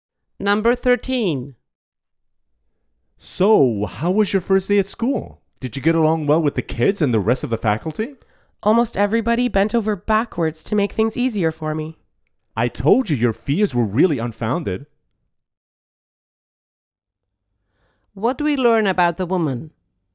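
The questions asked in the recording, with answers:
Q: What do we learn about the woman?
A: The people at school were very helpful to her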